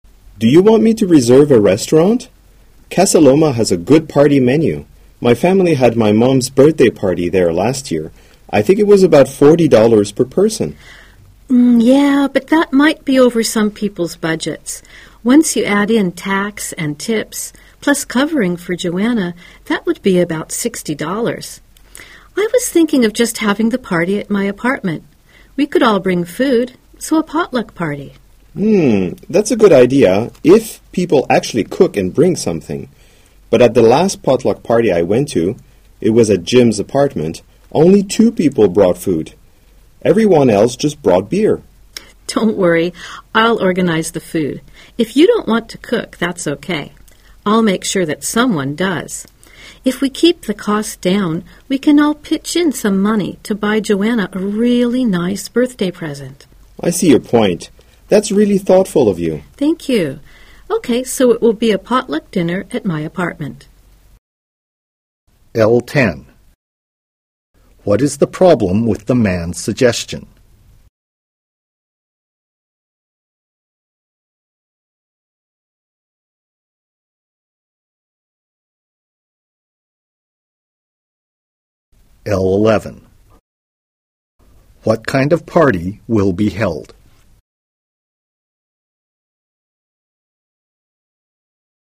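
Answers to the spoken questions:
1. The restaurant would be too expensive for some people's budgets
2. A potluck dinner at the woman's apartment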